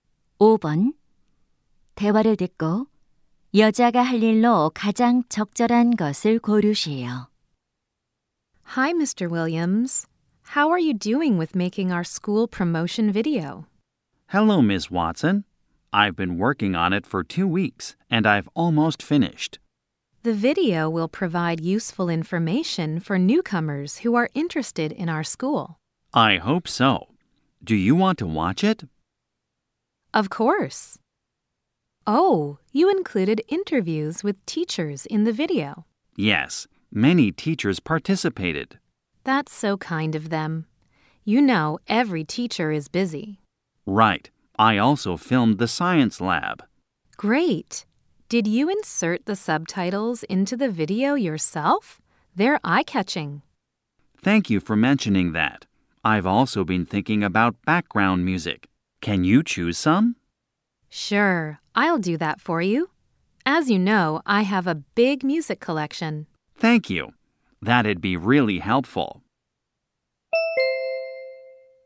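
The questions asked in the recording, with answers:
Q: 대화를 듣고 여자가 할 일로 가장 적절한 것을 고르시오.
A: 홍보 영상의 배경 음악 고르기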